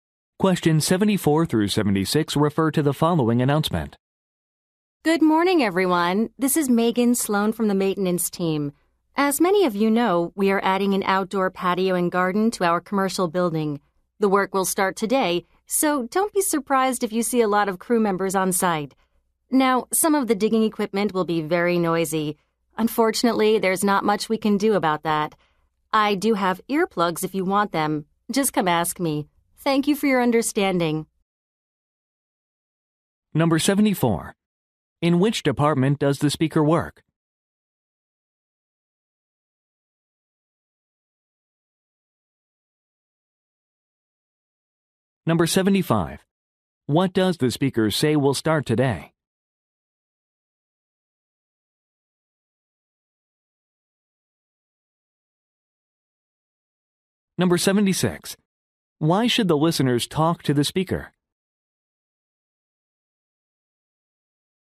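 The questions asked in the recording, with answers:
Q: In which department does the speaker work?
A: Maintenance

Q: What does the speaker say will start today?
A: Construction of an outdoor patio and garden

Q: Why should the listeners talk to the speaker?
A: To get earplugs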